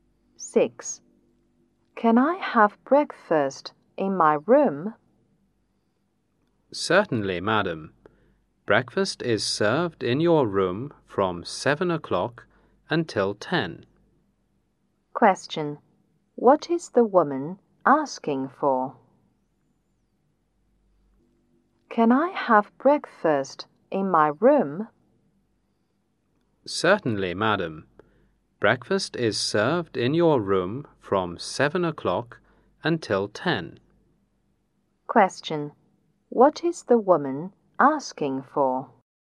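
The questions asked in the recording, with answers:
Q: What is the woman asking for?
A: Breakfast served in her room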